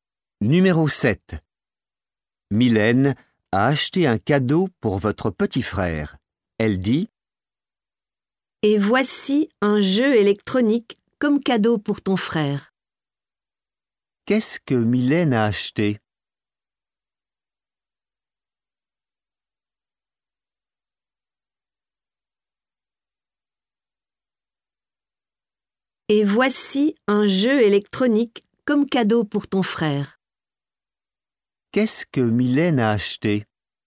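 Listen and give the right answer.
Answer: Un jeu électronique pour votre frère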